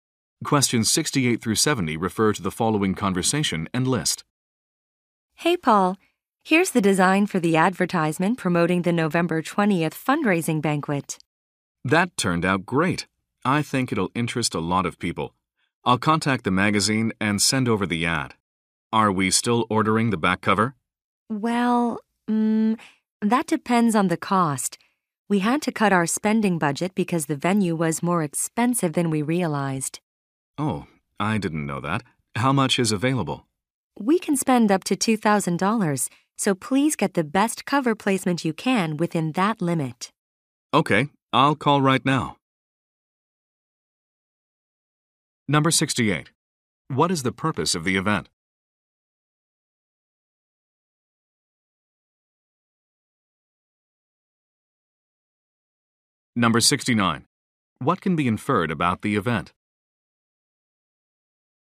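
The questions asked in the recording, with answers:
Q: What is the purpose of the event?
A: Fundraising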